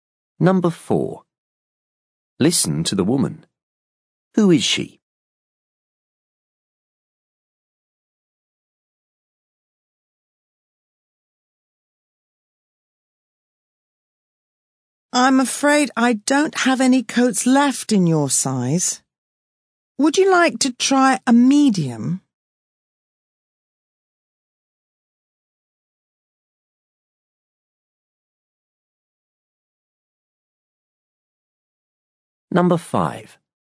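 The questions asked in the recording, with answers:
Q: Who is she?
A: A shop assistant in a clothes shop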